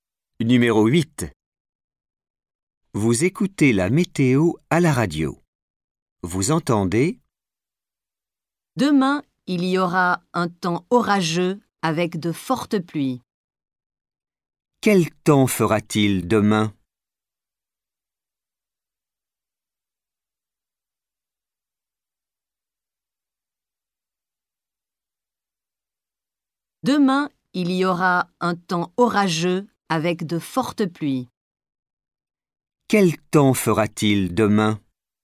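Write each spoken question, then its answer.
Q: Quel temps fera-t-il demain ?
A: Orageux, avec de fortes pluies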